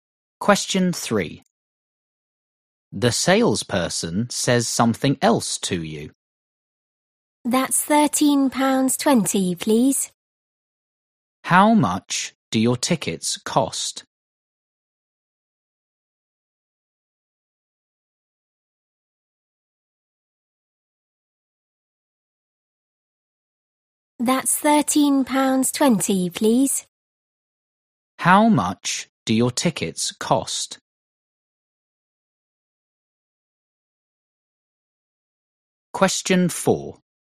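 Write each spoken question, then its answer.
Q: How much do your tickets cost?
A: £13.20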